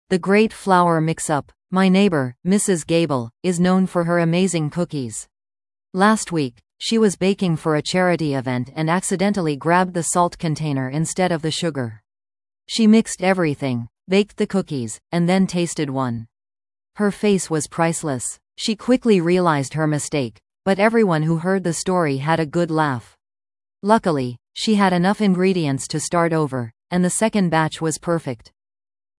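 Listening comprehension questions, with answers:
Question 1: Why was Mrs. Gable baking cookies?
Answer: For a charity event.

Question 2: What happened immediately after Mrs. Gable tasted the cookies?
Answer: She quickly realized she had used salt instead of sugar.

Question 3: What can be inferred about Mrs. Gable from the story?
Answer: She is a good baker who fixes her mistakes and starts again.

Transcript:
The Great Flour Mix-Up
My neighbor, Mrs. Gable, is known for her amazing cookies. Last week, she was baking for a charity event and accidentally grabbed the salt container instead of the sugar. She mixed everything, baked the cookies, and then tasted one. Her face was priceless! She quickly realized her mistake, but everyone who heard the story had a good laugh. Luckily, she had enough ingredients to start over, and the second batch was perfect.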